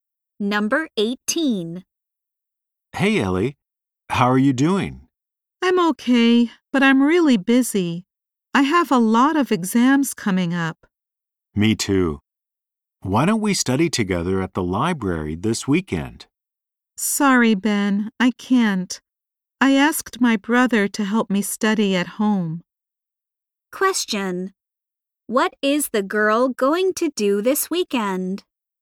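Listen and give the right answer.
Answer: Study at home with her brother.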